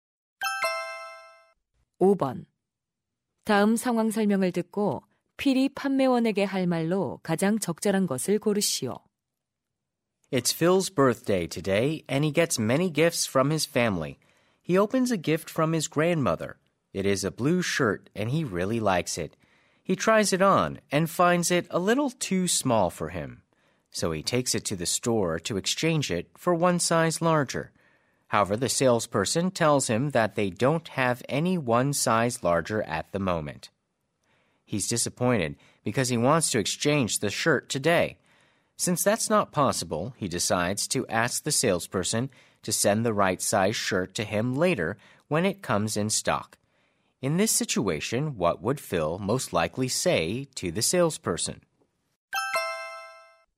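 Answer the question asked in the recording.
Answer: Could you send me the shirt one size larger when it comes in stock?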